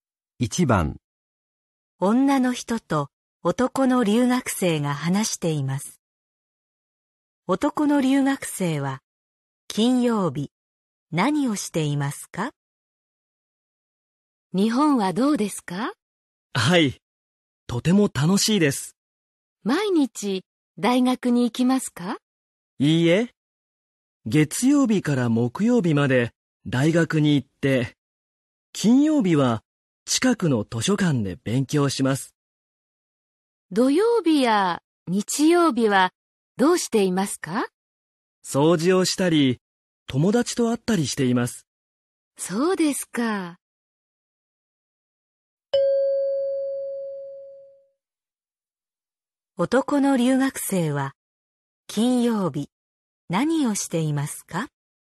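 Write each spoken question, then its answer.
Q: 男の留学生は金曜日何をしていますか?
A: 近くの図書館で勉強する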